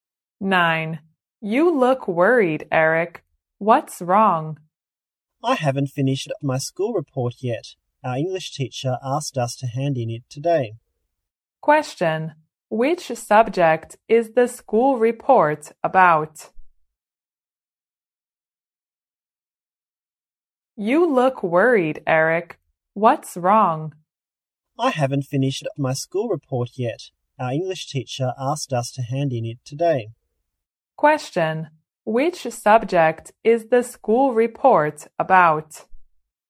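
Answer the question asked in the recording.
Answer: English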